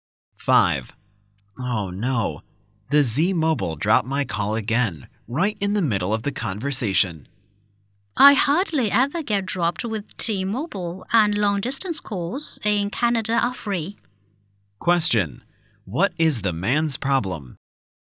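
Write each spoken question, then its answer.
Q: What is the man's problem?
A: His calls keep getting dropped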